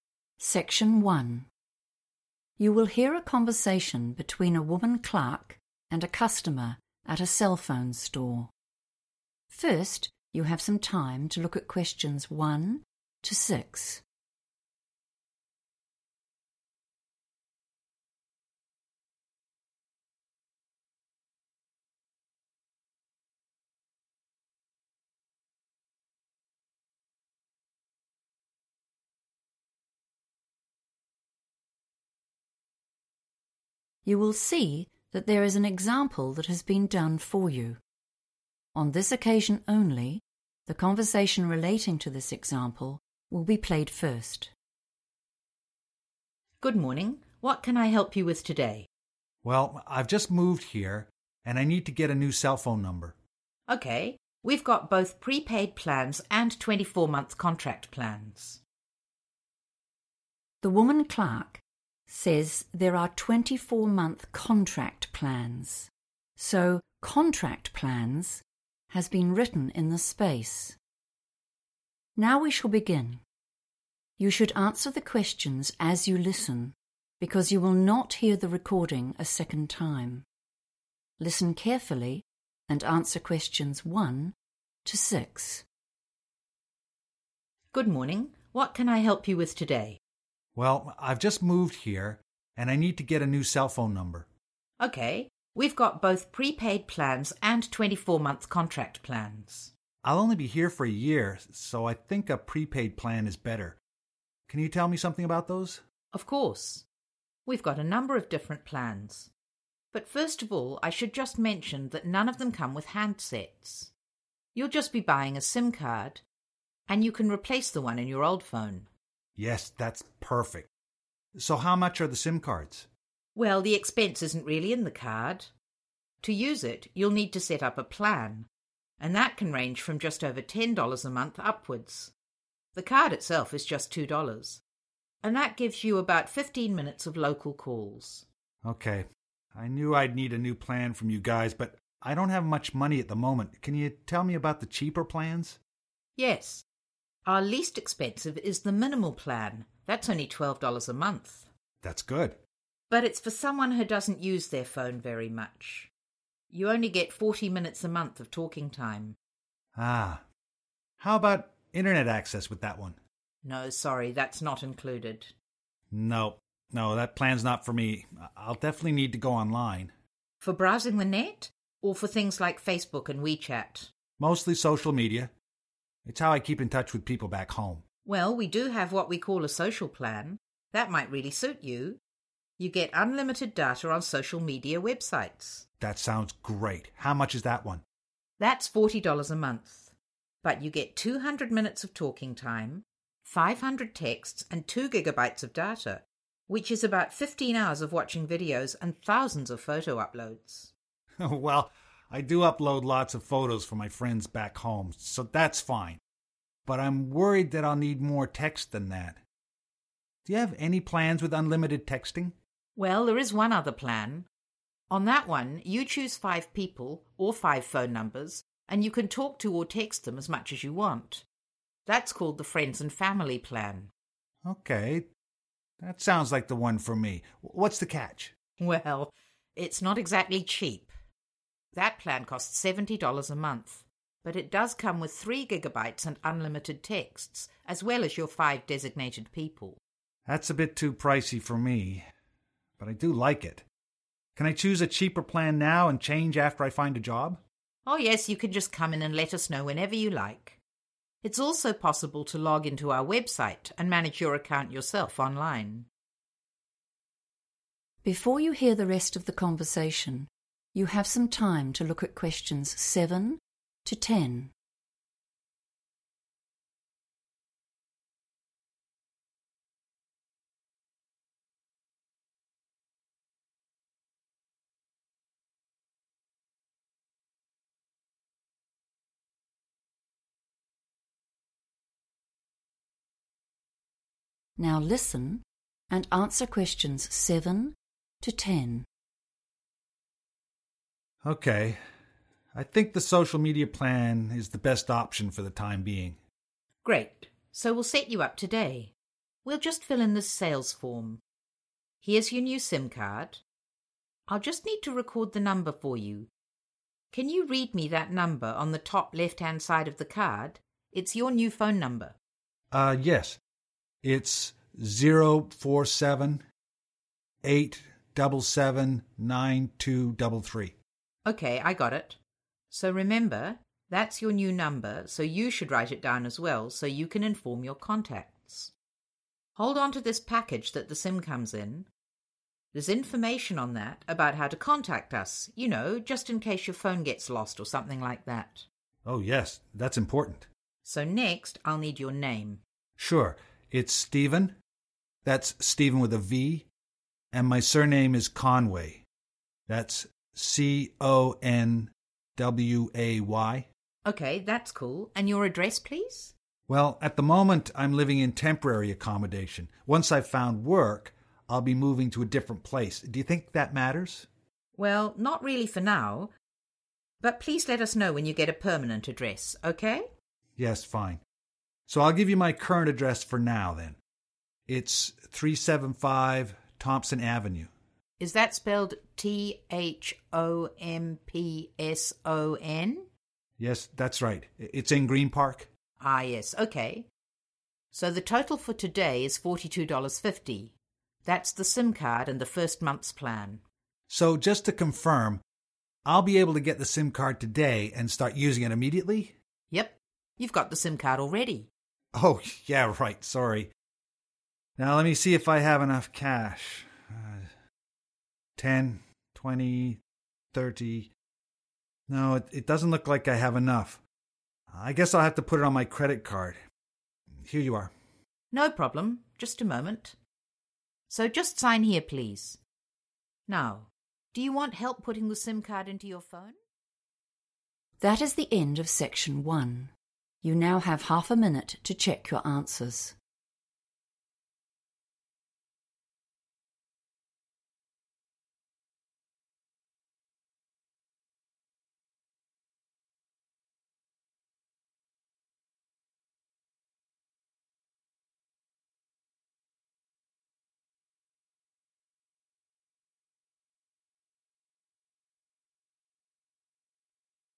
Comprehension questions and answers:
Complete the table below. Write NO MORE THAN THREE WORDS AND/OR A NUMBER for each answer.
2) 15 minutes of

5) Plan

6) access the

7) 047 -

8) Customer Name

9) 375 Thompson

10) Payment Method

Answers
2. local calls
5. Friends And Family
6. website
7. 8779233
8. Steven Conway
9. Avenue
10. credit card

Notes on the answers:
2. The correct answer is found when the shop assistant describes the SIM card price and what is included. She explains that the card costs 2 dollars and that this price includes 15 minutes of talk time for "local calls," which are calls to phones within the same nearby area.
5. The correct answer is identified by matching the row's description in the table (which includes five phone numbers, free calls and texts, a $70 monthly price, and 3GB of data) with the woman's explanation in the transcript. She explains that a package with these exact features is named the 'Friends and Family Plan.' Keywords to note are 'five people,' 'text them as much as you want,' and '3 gigabytes.'
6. The correct answer is 'website' because the woman tells the man that he has two ways to change his phone plan: he can visit the store ('come in'), or he can use the company's 'website' to manage his account online. Since 'in person' is already mentioned in the table, 'website' is the missing method.
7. The correct answer is found when the man reads the number printed on his SIM card. He says '0 – 4 –7', which matches the first part of the form. He then continues with '8 – double 7 – 9 – 2 – double 3'. In phone numbers, 'double' means the number is repeated twice. So, 'double 7' is 77 and 'double 3' is 33. Combining these remaining numbers gives 8779233.
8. The correct answer is Steven Conway because he provides this information when the salesperson asks for his name to complete the form. He even explains that his first name contains a 'v' and carefully spells out his last name (surname) to ensure it is written correctly.
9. The correct answer is 'Avenue' because the man gives his current location in the transcript by saying '375 Thompson Avenue' right after the woman asks for his address.
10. The correct answer is found at the end of the conversation. The man wants to pay for his new phone plan and SIM card. He first checks how much cash he has, but he realizes it is not enough to cover the total price. Therefore, he offers to pay using his credit card instead.

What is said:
WOMAN: Good morning. What can I help you with today?
MAN: Well, I've just moved here, and I need to get a new cell phone number.
WOMAN: OK, we've got both pre-paid plans and 24-month contract plans ...
MAN: l'll only be here for a year, so I think a pre-paid plan is better. Can you tell me something about those?
WOMAN: Of course. We've got a number of different plans, but first of all I should just mention that none of them come with handsets. You'll just be buying a SIM card, and you can replace the one in your old phone.
MAN: Yes, that's perfect. So, how much are the SIM cards?
WOMAN: Well the expense isn't really in the card. To use it, you'll need to set up a plan, and that can range from just over 10 dollars a month upwards. The card itself is just 2 dollars, and that gives you about 15 minutes of local calls.
MAN: Ok, I knew I'd need a new plan from you guys, but I don't have much money at the moment. Can you tell me about the cheaper plans?
WOMAN: Yes. Our least expensive is the 'Minimal Plan' ... it's only 12 dollars a month.
MAN: That's good ...
but it's for someone who doesn't use their phone very much. You only get 40 minutes a month of talking time.
MAN: Ah ... how about internet access with that one?
WOMAN: No, sorry, that's not included.
MAN: No, no, that plan's not for me. I'll definitely need to go online.
WOMAN: For browsing the net, or for things like Facebook and We Chat?
MAN: Mostly social media. It's how I keep in touch with people back home.
WOMAN: Well, we do have what we call a Social Plan. That might really suit you. You get unlimited data on social media websites.
MAN: That sounds great. How much is that one?
WOMAN: That's 40 dollars a month. But you get 200 minutes of talking time, 500 texts and 2 gigabytes of data, which is about 15 hours of watching videos, and thousands of photo uploads.
MAN: Well, I do upload lots of photos for my friends back home, so that's fine. But I'm worried that I'll need more texts than that. Do you have any plans with unlimited texting?
Well, there is one other plan. On that one, you choose five people, or five phone numbers, and you can talk to or text them as much as you want. That's called the Friends and Family Plan.
MAN: OK, that sounds like the one for me! What's the catch?
WOMAN: Well it's not exactly cheap. That plan costs 70 dollars a month, but it does come with 3 gigabytes and unlimited texts, as well as your 5 designated people.
MAN: That's a bit too pricey for me, but I do like it. Can I choose a cheaper plan now and change after I find a job?
WOMAN: Yes, you can just come in and let us know whenever you like. It's also possible to log into our website and manage your account yourself online.
MAN: OK. I think the social media plan is the best option for the time being.
WOMAN: Great, so we'll set you up today. We'll just fill in this sales form. Here's your new SIM card. I'll just need to record the number for you. Can you read me that number on the top left hand side of the card? It's your new phone number.
WOMAN: Ok, I got it. So remember, that's your new number, so you should write it down as well so you can inform your contacts. Hold onto this package that the SIM comes in. There's information on that about how to contact us, you know, just in case your phone gets lost or something like that.
MAN: Oh yes, that's important.
WOMAN: So, next I'll need your name.
MAN: Sure. It's Steven, that's Steven with a v. And my surname is Conway. That's C – O – N – W – A –Y.
WOMAN: Ok, that's cool, and your address please?
MAN: Well, at the moment I'm living in temporary accommodation. Once I've found work, I'll be moving to a different place. Do you think that matters?
WOMAN: Well, not really for now, but please let us know when you get a permanent address, OK?
MAN: Yes, fine. So I'll just give you my current address for now, then. It's 375 Thompson Avenue.
WOMAN: Is that spelled T-H-O-M-P-S-O-N?
MAN: Yes, that's right. It's in Greenpark.
WOMAN: Ah, yes. OK. So, the total for today is $42.50, that's the SIM card and the first month's plan.
MAN: So just to confirm, I'll be able to get the SIM card today and start using it immediately?
WOMAN: Yep. You've got the SIM card already.
MAN: Oh ... yeah, right, sorry! Now, let me see if I have enough cash. No, it doesn't look like I have enough. I guess I'll have to put it on my credit card. Here you are.
WOMAN: No problem ... Just a moment ... So, just sign here, please. Now, do you want help putting the SIM card into your phone?